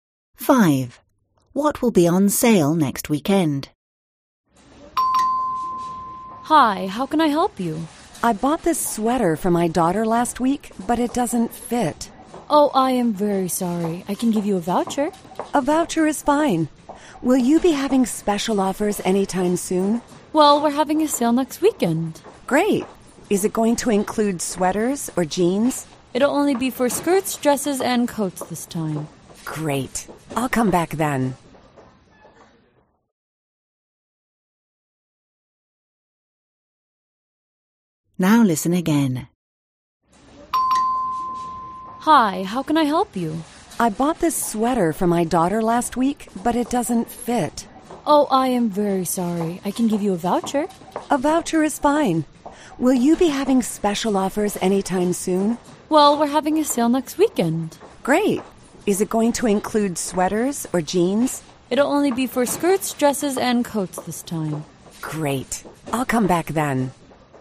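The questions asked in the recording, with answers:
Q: What will be on sale next weekend?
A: Skirts, dresses and coats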